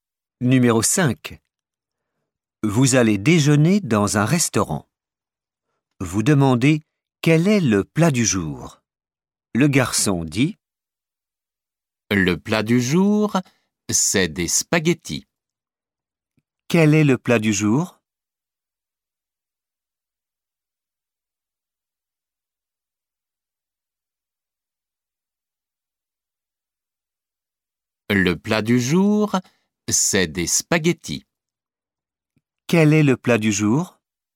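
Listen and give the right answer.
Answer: Des spaghettis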